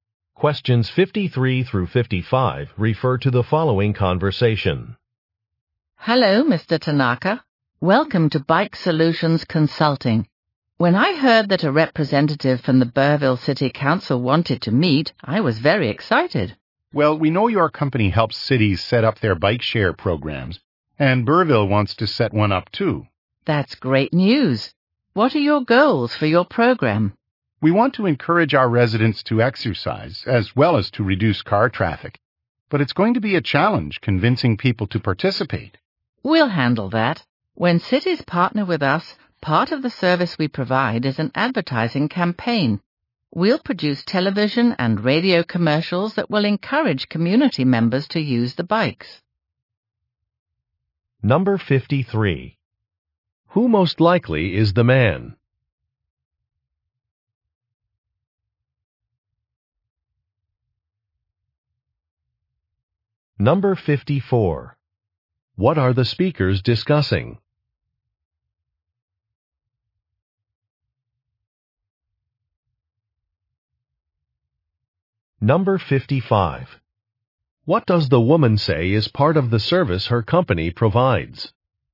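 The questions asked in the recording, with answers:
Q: Who most likely is the man?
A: A city council representative

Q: What are the speakers discussing?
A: Setting up a bike share program

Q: What does the woman say is part of the service her company provides?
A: An advertising campaign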